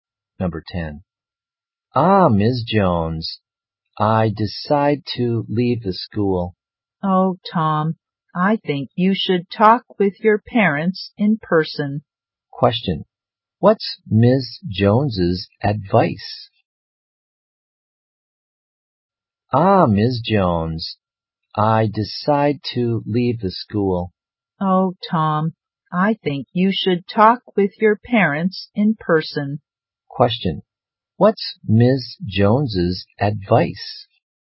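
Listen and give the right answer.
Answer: Talk with his parents in person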